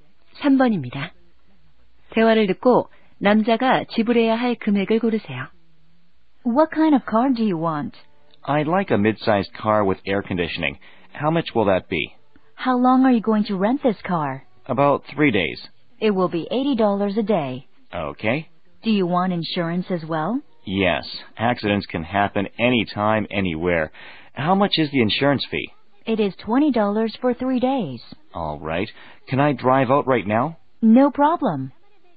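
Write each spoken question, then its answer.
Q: 대화를 듣고 남자가 지불해야 할 금액을 고르세요.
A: $260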